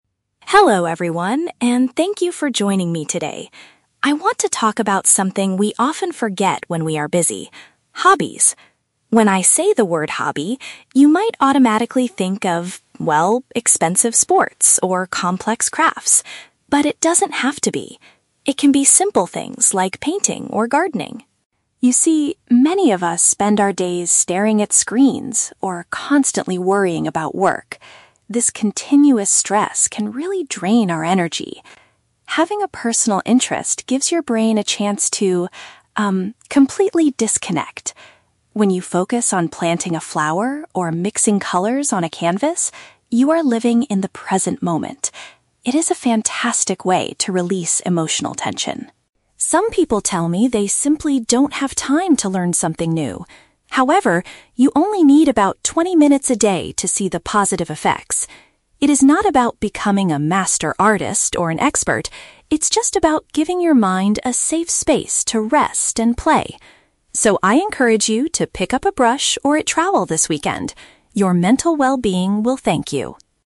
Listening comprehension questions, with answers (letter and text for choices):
Listen to a short presentation at a community event. Choose the correct answer (A, B, or C) for each question.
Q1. According to the speaker, what do people usually associate hobbies with?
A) High costs and complicated activities.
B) Spending too much time looking at screens.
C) Activities designed mainly for young children.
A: A) High costs and complicated activities.

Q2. How does a hobby like gardening or painting help improve mental health?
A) It helps people find solutions to their workplace problems.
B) It provides a great opportunity to make new friends in the city.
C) It allows individuals to stay focused on the current moment.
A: C) It allows individuals to stay focused on the current moment.

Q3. What is the speaker's advice for people who feel they are too busy?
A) Spend just a short amount of time on the activity every day.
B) Wake up an hour earlier in the morning to finish their work.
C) Try to become a professional artist to make the effort worth it.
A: A) Spend just a short amount of time on the activity every day.

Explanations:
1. The Key: Emma says people might automatically think of "expensive sports or complex crafts". This is paraphrased as "High costs and complicated activities". The Trap (B): "Staring at screens" is mentioned in the audio, but it is what people do during their stressful daily lives, not what they think a hobby is (Mentioned but wrong context). Plausible Trap (C): Believing hobbies are just for kids is a common misconception, but the speaker never mentions children in her speech.
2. The Key: The speaker explains that when you focus on planting a flower or mixing colors, "you are living in the present moment". This perfectly matches option C ("stay focused on the current moment"). The Trap (A): The word "work" is mentioned, but hobbies are meant to help you "disconnect" from work worries, not solve them (Mentioned but wrong context). Plausible Trap (B): Meeting new friends is a real benefit of many hobbies, but Emma only talks about the mental benefits of focusing your mind, not social benefits.
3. The Key: Emma says "you only need about twenty minutes a day to see the positive effects". "Twenty minutes a day" is paraphrased as "a short amount of time... every day". The Trap (C): A "master artist" (professional artist) is mentioned, but Emma explicitly says "It is not about becoming a master artist" (Mentioned but rejected). Plausible Trap (B): Waking up earlier is common time-management advice for busy people, but the speaker does not suggest this.

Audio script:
Emma: Hello everyone, and thank you for joining me today. I want to talk about something we often forget when we are busy: hobbies. When I say the word "hobby", you might automatically think of, well, expensive sports or complex crafts. But it doesn't have to be. It can be simple things like painting or gardening.
You see, many of us spend our days staring at screens or constantly worrying about work. This continuous stress can really drain our energy. Having a personal interest gives your brain a chance to, um, completely disconnect. When you focus on planting a flower or mixing colors on a canvas, you are living in the present moment. It is a fantastic way to release emotional tension.
Some people tell me they simply don't have time to learn something new. However, you only need about twenty minutes a day to see the positive effects. It is not about becoming a master artist or an expert; it's just about giving your mind a safe space to rest and play. So, I encourage you to pick up a brush or a trowel this weekend. Your mental well-being will thank you.